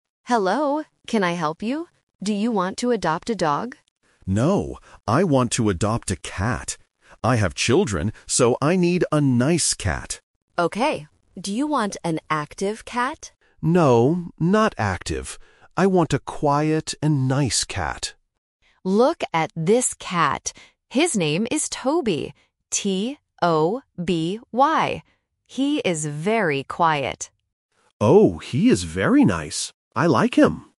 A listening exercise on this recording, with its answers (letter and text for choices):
Listen to the conversation and circle the correct answer for each question.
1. What animal does the customer want to adopt?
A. A dog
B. A cat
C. A bird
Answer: B. A cat

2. What kind of cat does the customer want?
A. Active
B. Quiet and nice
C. Lazy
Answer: B. Quiet and nice

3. What is the cat's name?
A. Tony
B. Toby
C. Tommy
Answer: B. Toby

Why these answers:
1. The correct answer is (B). The customer clearly says, "No, I want to adopt a cat." Option (A) "A dog" is a trap because the staff asks about a dog first, but the customer says "No." Option (C) "A bird" is never mentioned.
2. The correct answer is (B). The customer repeats, "I want a quiet and nice cat." Option (A) "Active" is the trap; the staff asks if they want an active cat, but the customer rejects it ("No, not active"). Option (C) "Lazy" is not mentioned in the audio.
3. The correct answer is (B). The shelter staff spells the cat's name clearly: "T-O-B-Y." Options (A) "Tony" and (C) "Tommy" are sound traps because they start with 'T' and sound very similar to the correct name.

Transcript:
Shelter Staff: Hello! Can I help you? Do you want to adopt a dog?
Customer: No, I want to adopt a cat. I have children, so I need a nice cat.
Shelter Staff: Okay. Do you want an active cat?
Customer: No, not active. I want a quiet and nice cat.
Shelter Staff: Look at this cat. His name is Toby. T-O-B-Y. He is very quiet.

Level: A1